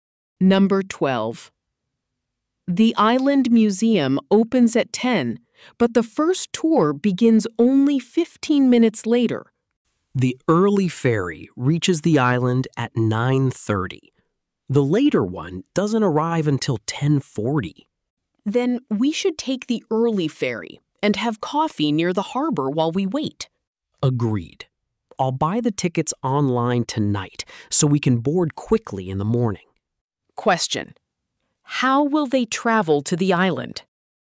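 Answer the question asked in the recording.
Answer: By the early ferry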